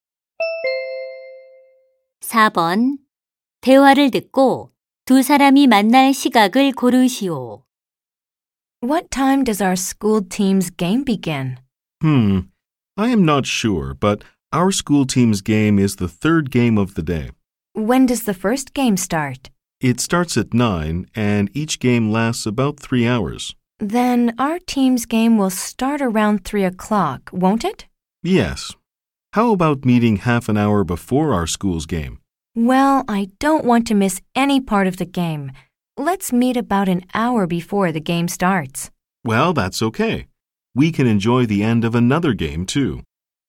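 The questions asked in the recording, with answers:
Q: 대화를 듣고 두 사람이 만날 시각을 고르시오.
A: 2시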